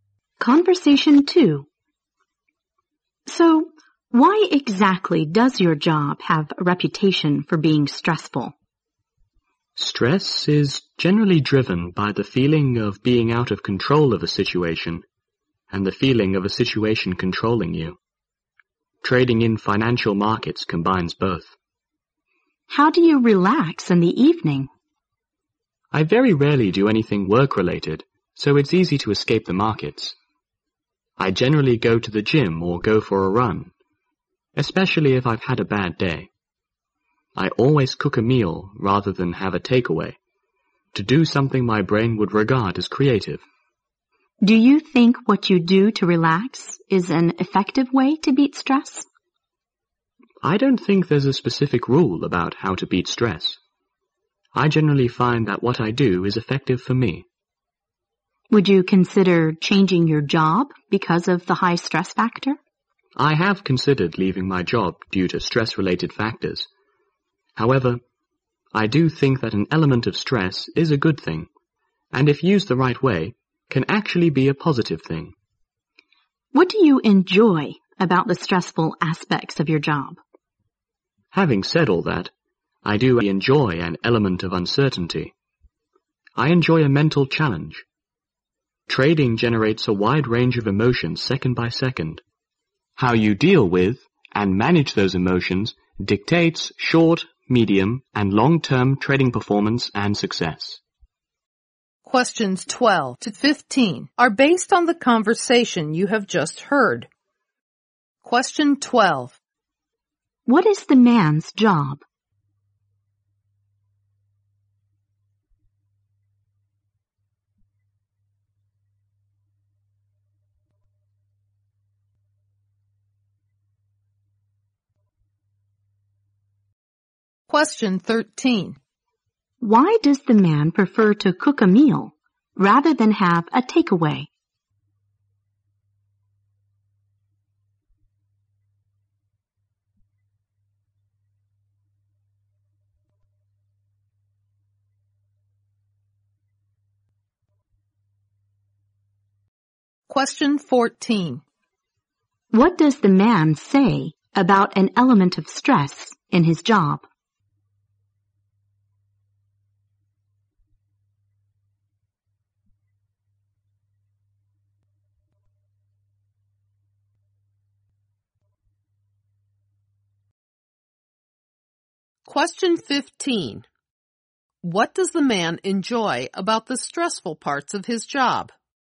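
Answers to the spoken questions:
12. He trades in financial markets.
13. To do something his brain regards as creative.
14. It is a good thing and, used the right way, can be positive.
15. The uncertainty and the mental challenge.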